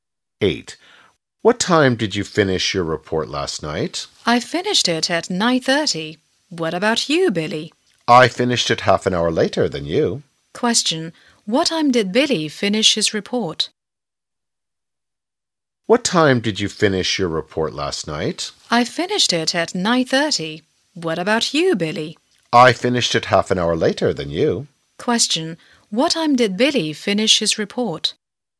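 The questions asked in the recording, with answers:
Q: What time did Billy finish his report?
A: At 10:00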